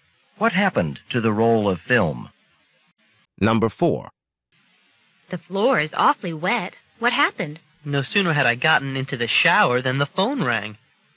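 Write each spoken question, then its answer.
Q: What does the man imply?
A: He got out of the shower, still wet, to answer the phone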